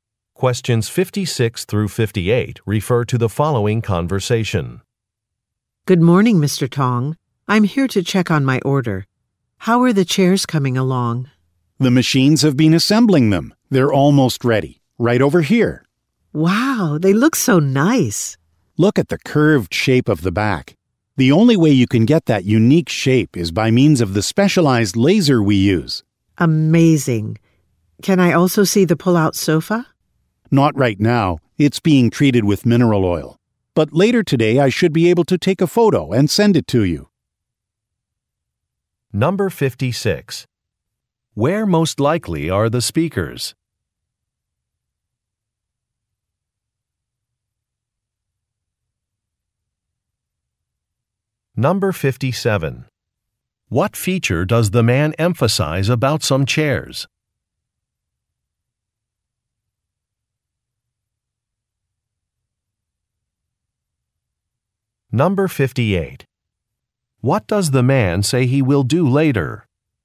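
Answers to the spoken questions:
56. At a furniture factory
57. The unique curved shape of the back
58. Take a photo of the sofa and send it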